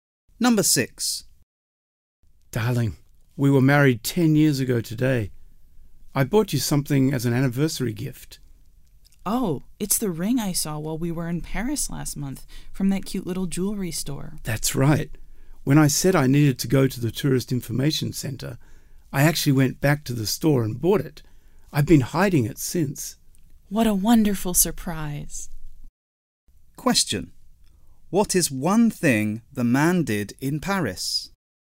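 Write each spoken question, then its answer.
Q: What is one thing the man did in Paris?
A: He bought a ring as an anniversary gift.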